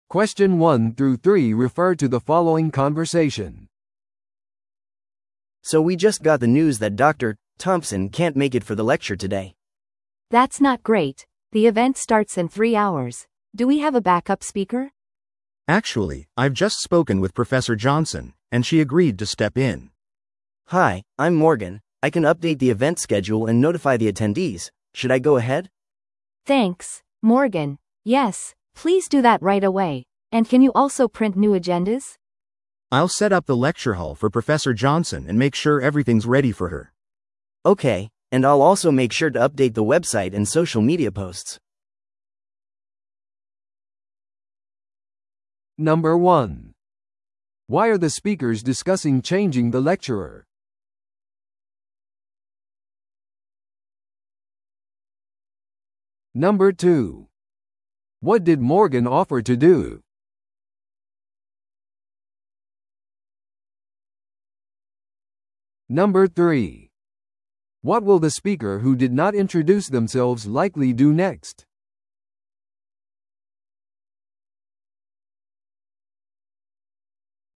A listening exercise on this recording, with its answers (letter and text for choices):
Listen to the audio below and answer the questions.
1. Why are the speakers discussing changing the lecturer?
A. もとの講師が参加できなくなったため。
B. 講義室の配置を変更する必要があるため。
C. より人気のある講師を望んでいるため。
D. イベントが新しい日に移動したため。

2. What did Morgan offer to do?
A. 予備の講演者に連絡をとる。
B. 新しいアジェンダを印刷し、参加者を更新する。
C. イベントの座席を再配置する。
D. イベントを別の日にスケジュールし直す。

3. What will the speaker who did not introduce themselves likely do next?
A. 代替の講師を見つける。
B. 新しい講師のための会場を準備する。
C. イベント中に変更を発表する。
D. もとの講師と調整を行う。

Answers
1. A. もとの講師が参加できなくなったため。
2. B. 新しいアジェンダを印刷し、参加者を更新する。
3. B. 新しい講師のための会場を準備する。

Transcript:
A: So we just got the news that Dr. Thompson can't make it for the lecture today.
B: That's not great. The event starts in three hours. Do we have a backup speaker?
C: Actually, I've just spoken with Professor Johnson, and she agreed to step in.
A: Hi, I'm Morgan. I can update the event schedule and notify the attendees. Should I go ahead?
B: Thanks, Morgan. Yes, please do that right away. And can you also print new agendas?
C: I'll set up the lecture hall for Professor Johnson and make sure everything's ready for her.
A: Okay, and I'll also make sure to update the website and social media posts.